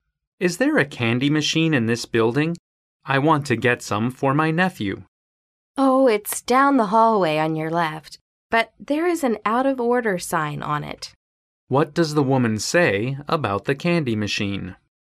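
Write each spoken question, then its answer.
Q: What does the woman say about the candy machine?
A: It is out of order.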